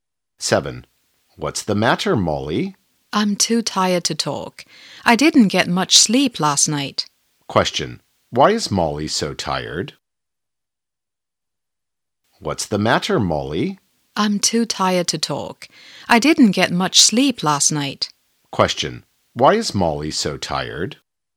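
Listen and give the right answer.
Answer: She didn't get much sleep last night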